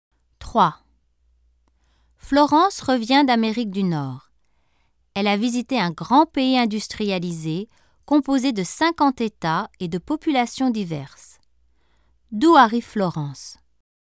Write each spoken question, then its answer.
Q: D'où arrive Florence?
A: Elle arrive des États-Unis.